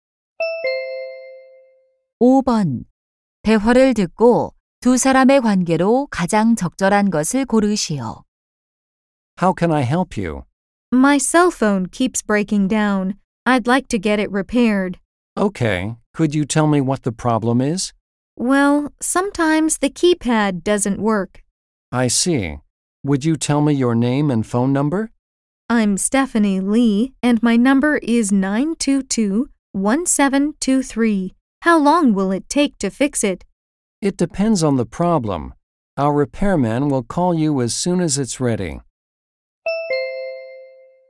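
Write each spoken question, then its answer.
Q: 대화를 듣고 두 사람의 관계로 가장 적절한 것을 고르시오.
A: 휴대폰 수리점 직원과 손님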